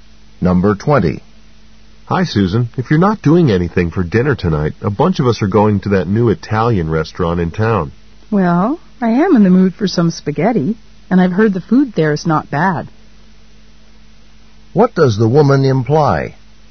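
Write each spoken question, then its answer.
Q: What does the woman imply?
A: She will probably go to the Italian restaurant.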